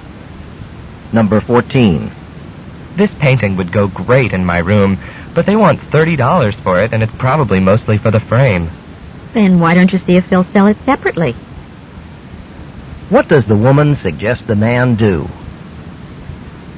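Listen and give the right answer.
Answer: Ask whether they'll sell the painting without the frame.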